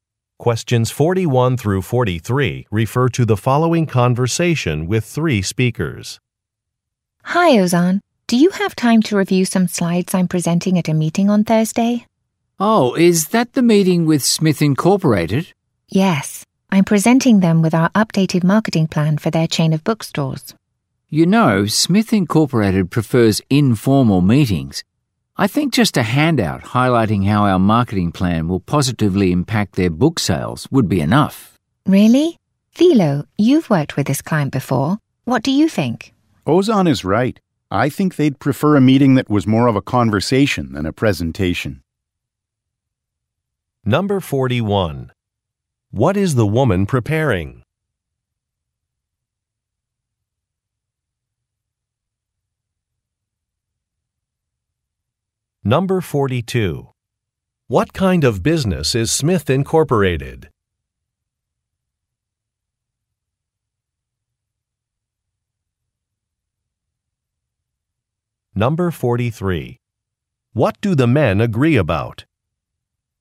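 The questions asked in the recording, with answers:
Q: What is the woman preparing?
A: Presentation slides

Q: What kind of business is Smith Incorporated?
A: A bookstore chain

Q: What do the men agree about?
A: The client prefers an informal meeting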